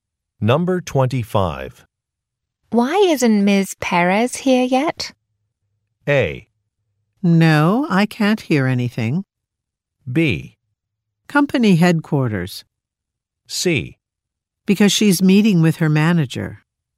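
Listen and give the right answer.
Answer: C: Because she's meeting with her manager.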